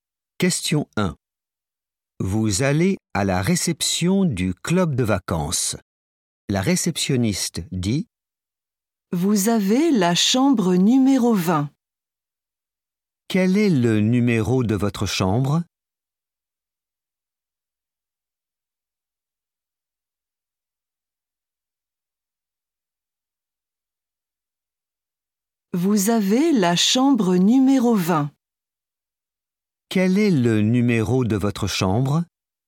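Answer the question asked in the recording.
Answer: 20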